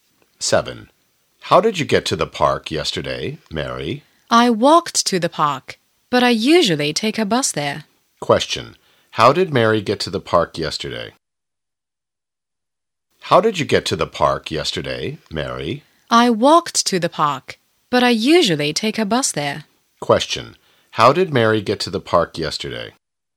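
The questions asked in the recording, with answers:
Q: How did Mary get to the park yesterday?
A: She walked.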